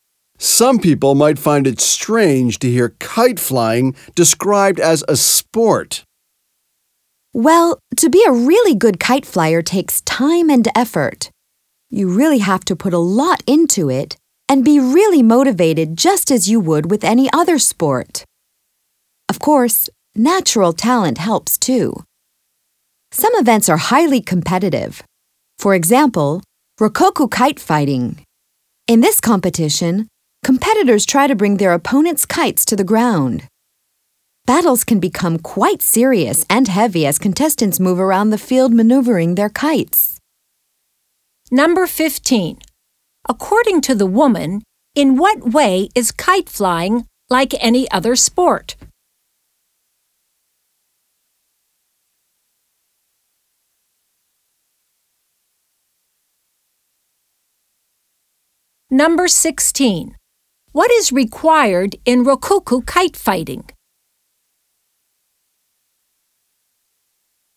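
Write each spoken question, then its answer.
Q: According to the woman, in what way is kite flying like any other sport?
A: It takes time, effort and motivation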